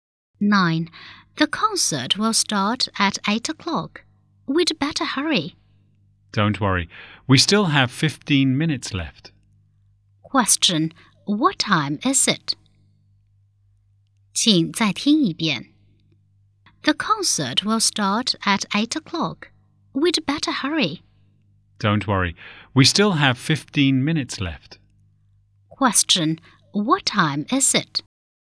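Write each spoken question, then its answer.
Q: what time is it?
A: 7:45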